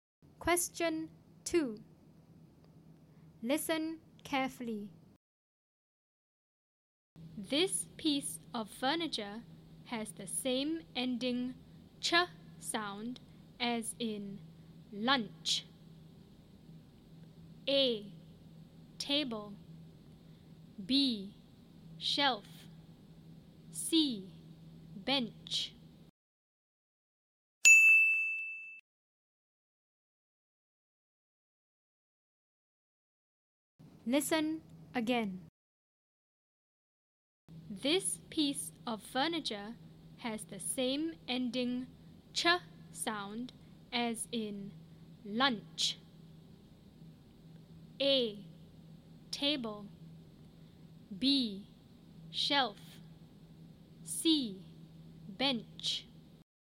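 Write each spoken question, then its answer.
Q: This piece of furniture has the same ending ch sound as in lunch.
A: C: Bench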